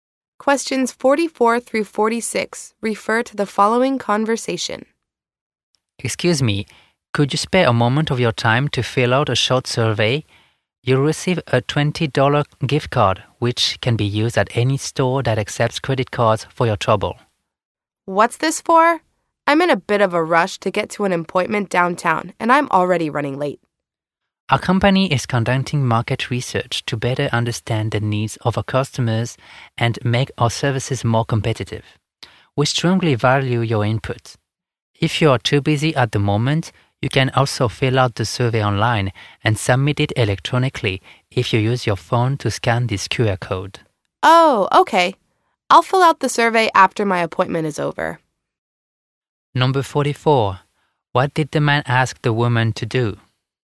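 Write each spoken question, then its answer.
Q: What did the man ask the woman to do?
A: Fill out a short survey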